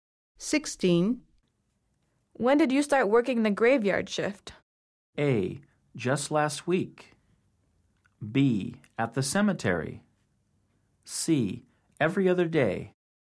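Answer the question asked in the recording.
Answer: A: Just last week.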